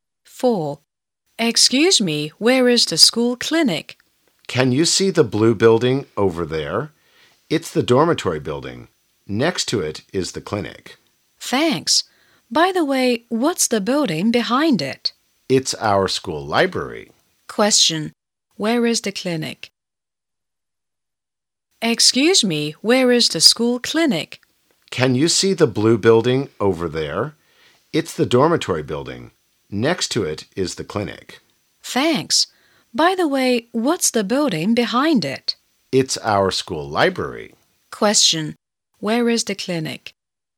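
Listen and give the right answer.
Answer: Next to the blue dormitory building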